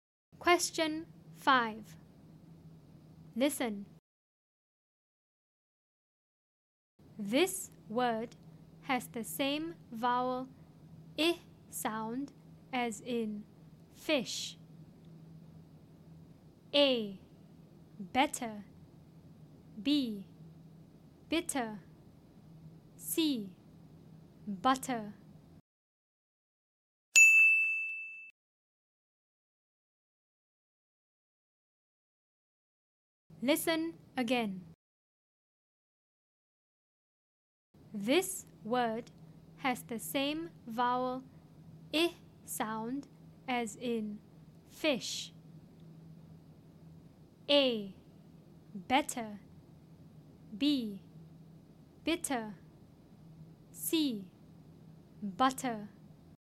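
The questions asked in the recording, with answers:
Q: This word has the same vowel I sound as in fish.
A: B: Bitter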